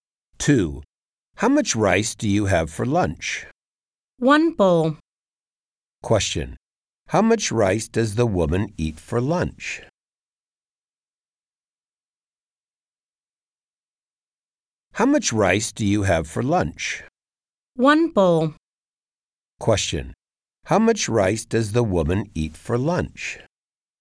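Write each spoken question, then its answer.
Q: How much rice does the woman eat for lunch?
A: One bowl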